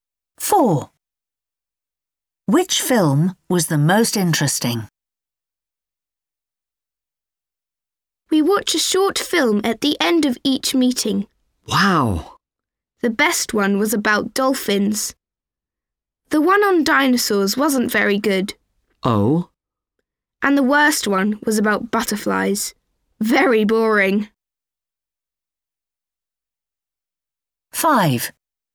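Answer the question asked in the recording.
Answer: the one about dolphins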